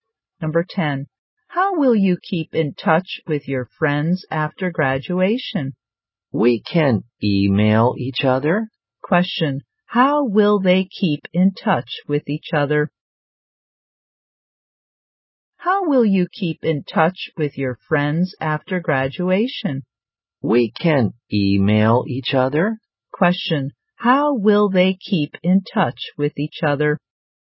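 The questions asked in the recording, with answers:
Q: Question. How will they keep in touch with each other?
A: By email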